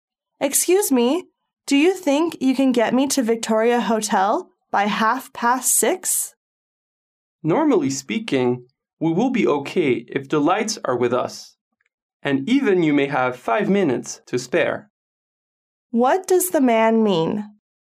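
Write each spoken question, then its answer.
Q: What does the man mean?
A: They can probably get to the hotel by 6:30, maybe with 5 minutes to spare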